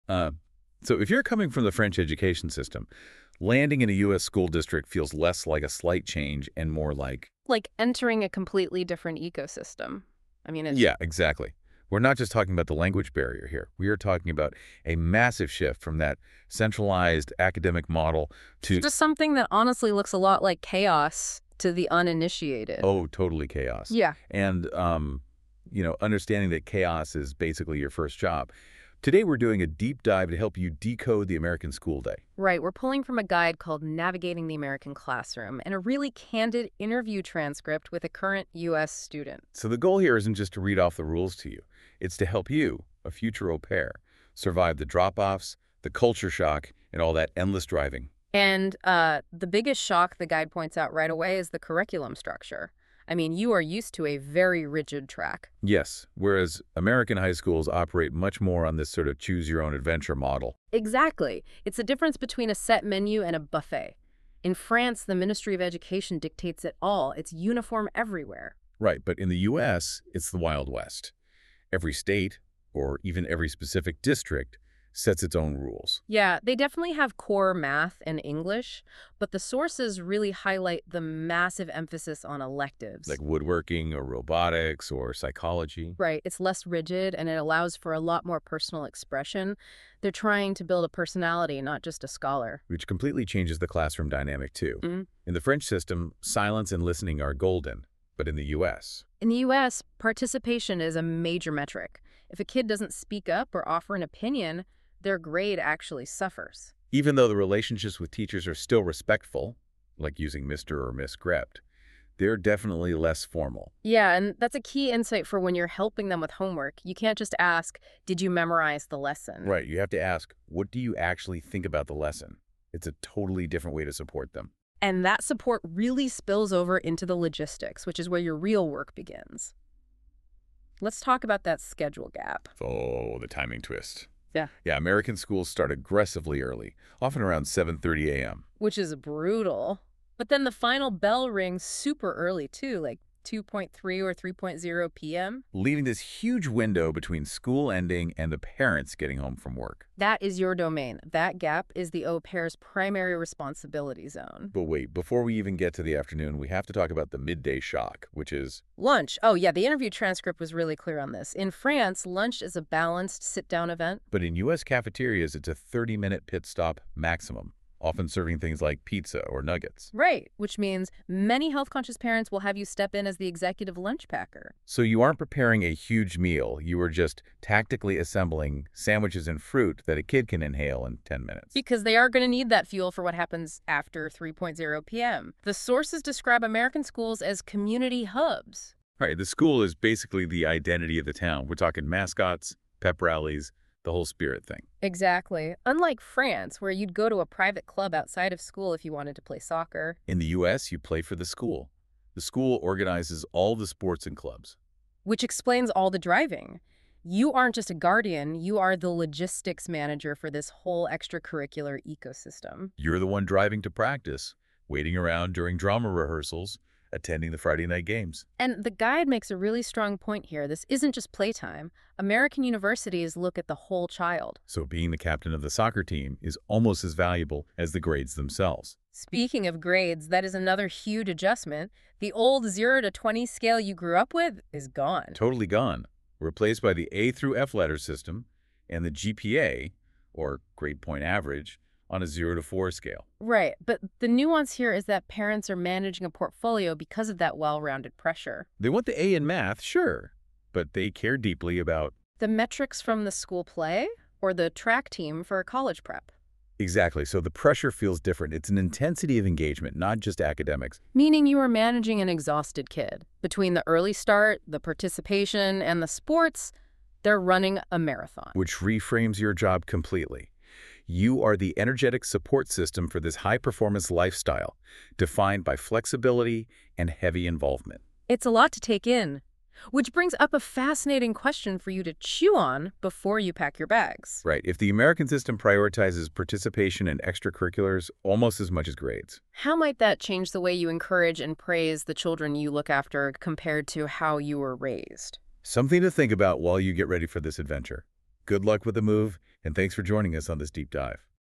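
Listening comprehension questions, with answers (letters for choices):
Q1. How does the curriculum structure in the U.S. generally differ from the French system?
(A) The U.S. has a uniform national curriculum set by a central ministry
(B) U.S. schools focus exclusively on core subjects like math and English.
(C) The U.S. system is more rigid and academic-focused.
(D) The U.S. system allows for more personal expression through electives.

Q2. In a U.S. classroom, what happens if a student remains silent and does not offer opinions?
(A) Their grade may actually suffer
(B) It has no effect on their academic standing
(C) They are praised for their respectful listening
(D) They are sent to the principal's office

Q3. What is a typical start time for many American schools?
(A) 8:30 AM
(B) 10:00 AM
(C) 9:00 AM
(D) 7:30 AM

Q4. Which of the following describes the 'lunch shock' au pairs might face in the U.S.?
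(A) A 30-minute 'pit stop' often involving finger foods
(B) A long, sit-down meal with multiple courses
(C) A two-hour break where students go home for lunch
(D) A meal prepared entirely by the school's gourmet chefs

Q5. What is the 'afternoon responsibility zone' for an au pair?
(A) The early morning school drop-off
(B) The gap between school ending and parents returning from work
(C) Late night hours after the kids go to bed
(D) The time between 7:30AM and 2:00 PM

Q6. How are extracurricular activities (like sports or drama) usually organized in the U.S.?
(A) They are integrated and organized by the school itself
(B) They are exclusively run by private clubs outside of school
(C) They are mandatory but do not affect college admissions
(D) They are discouraged in favor of more study time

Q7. When helping a child with homework in the U.S., what shift in approach is suggested?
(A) Checking for perfect grammar and spelling only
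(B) Ensuring they remain silent while working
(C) Asking them what they actually think about the lesson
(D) Focusing on only whether they memorized the lesson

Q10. As an au pair, what logistics would you be responsible for?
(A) You would be responsible for the school's bus route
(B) You would organize the school's curriculum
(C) You would drive the children to various sports, clubs, and rehearsals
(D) You would be in charge of the family's finances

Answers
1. D
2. A
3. D
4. A
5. B
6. A
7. C
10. C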